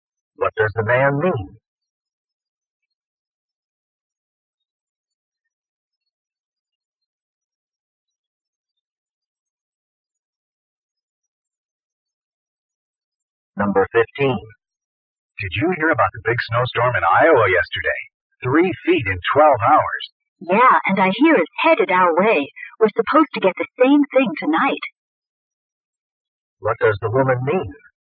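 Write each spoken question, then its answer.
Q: What does the woman mean?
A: A similar heavy snowstorm is expected here tonight.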